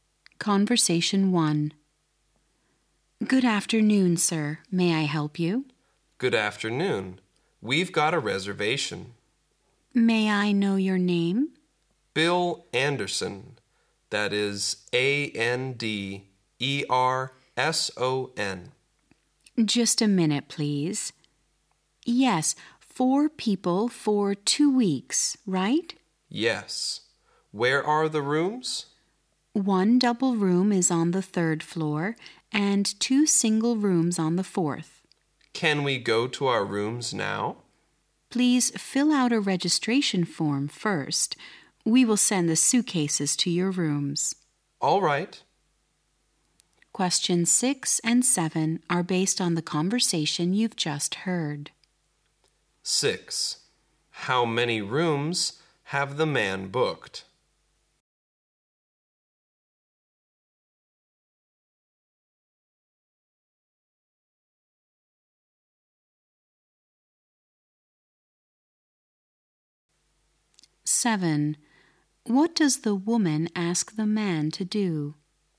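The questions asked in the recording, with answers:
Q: How many rooms have the man booked?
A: Three

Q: What does the woman ask the man to do?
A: Fill out a registration form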